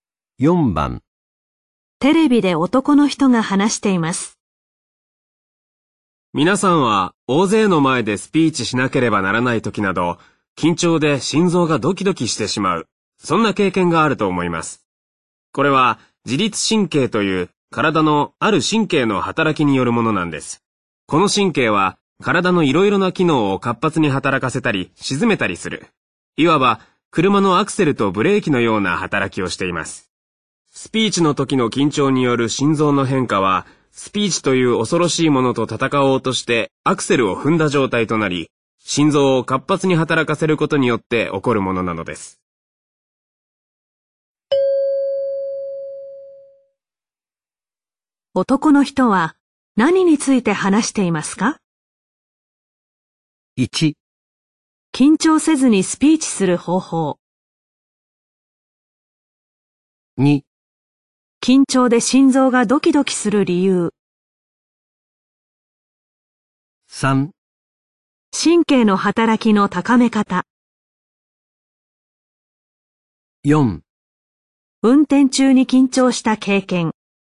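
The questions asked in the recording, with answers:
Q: 男の人は何について話していますか?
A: 2: 緊張で心臓がドキドキする理由。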